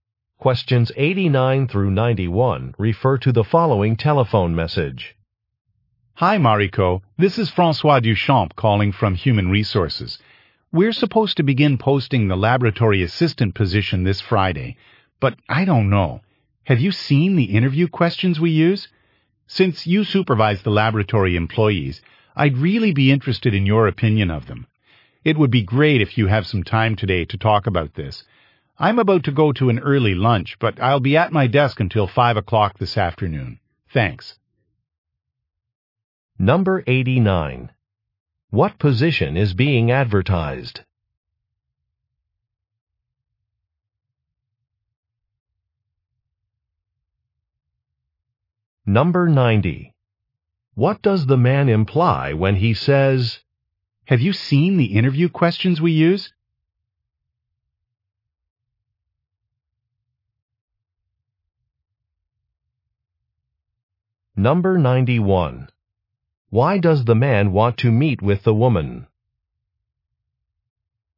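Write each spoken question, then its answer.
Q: What position is being advertised?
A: Laboratory assistant.

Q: Why does the man want to meet with the woman?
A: To get her opinion of the interview questions.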